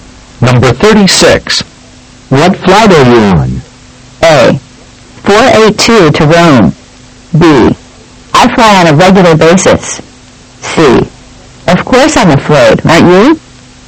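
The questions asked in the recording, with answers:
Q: What flight are you on?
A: A: 482 to Rome.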